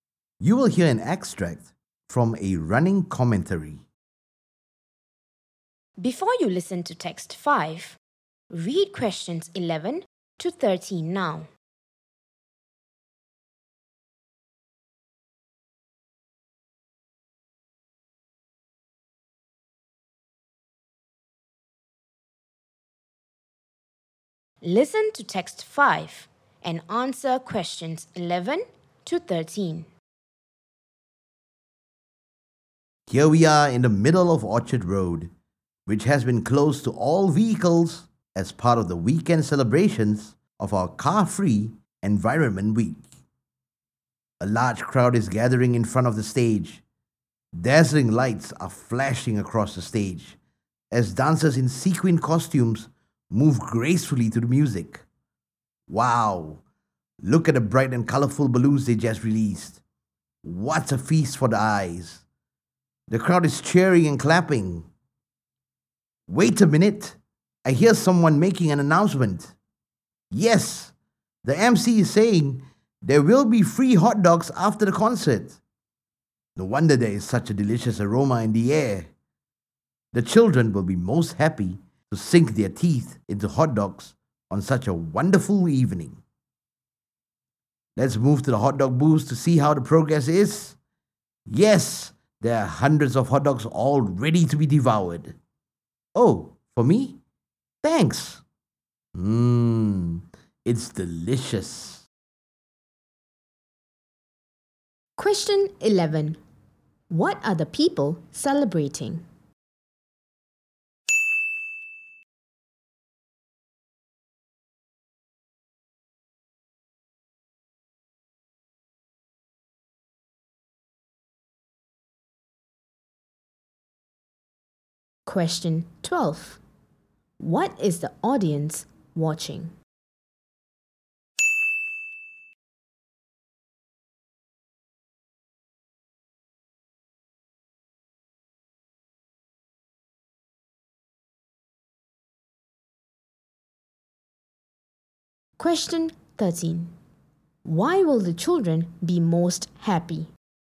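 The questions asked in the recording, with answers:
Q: What are the people celebrating?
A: Car-Free Environment Week

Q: Why will the children be most happy?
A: There will be free hot dogs after the concert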